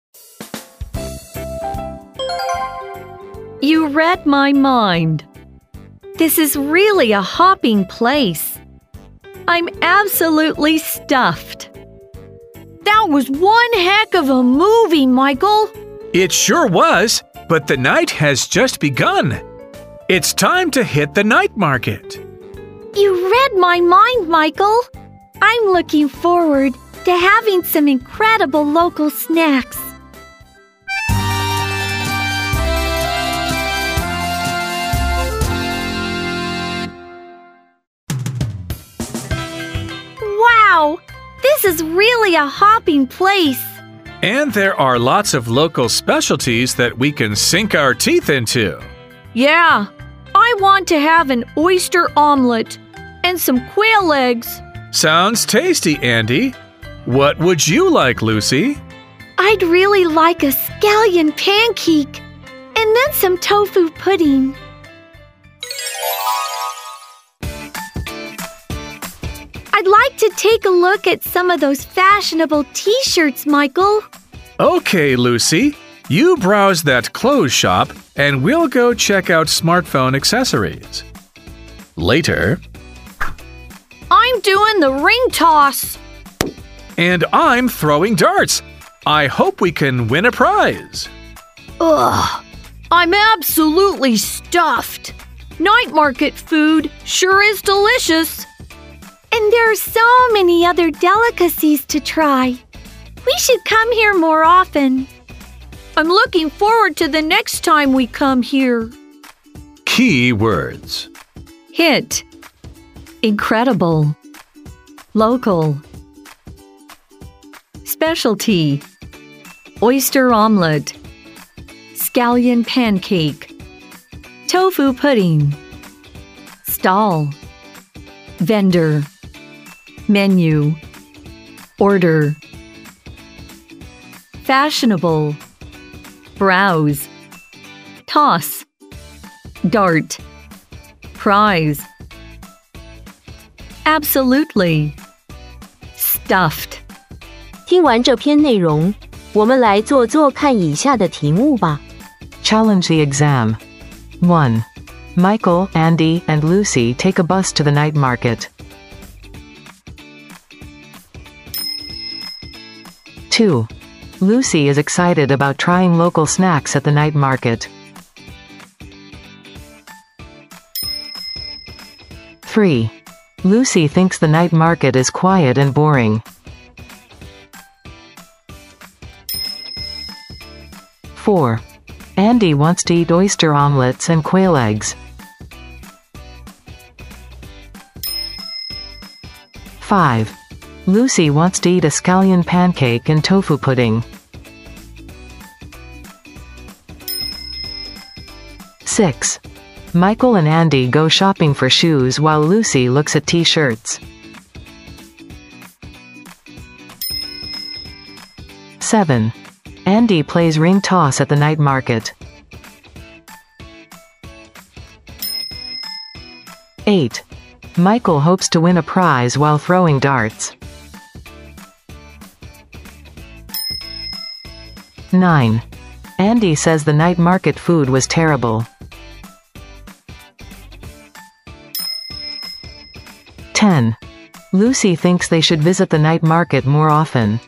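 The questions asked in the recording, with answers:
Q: Andy wants to eat oyster omelets and quail eggs.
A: True

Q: Lucy wants to eat a scallion pancake and tofu pudding.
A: True

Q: Michael and Andy go shopping for shoes while Lucy looks at t-shirts.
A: False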